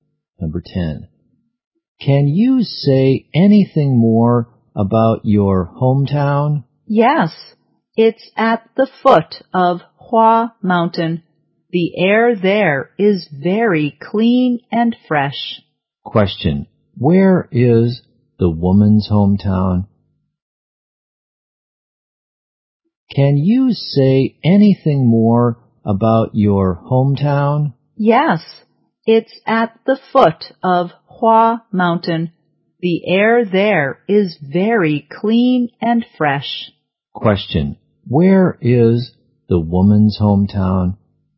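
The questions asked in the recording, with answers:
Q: Question. Where is the woman's hometown?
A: At the foot of Hua Mountain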